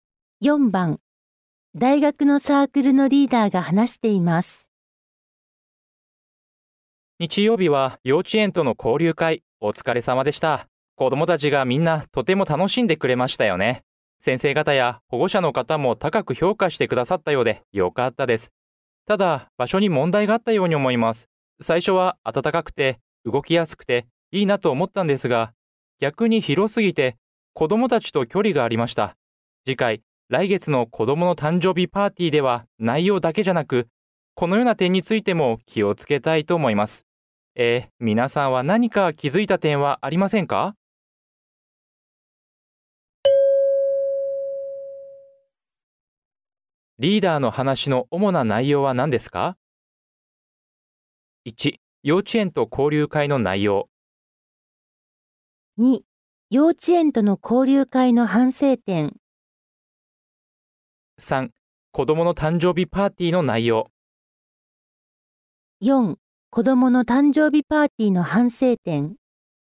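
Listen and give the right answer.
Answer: 2: 幼稚園との交流会の反省点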